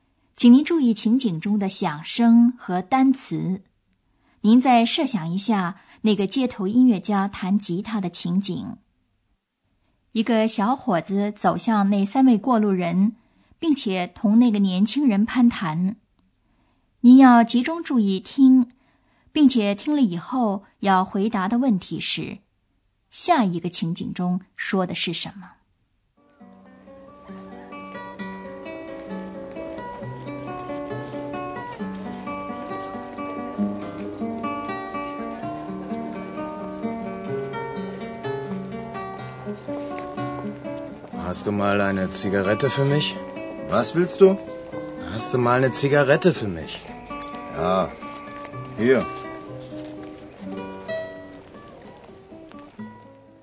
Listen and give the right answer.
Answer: 这个情景中说的是一个小伙子想要一支烟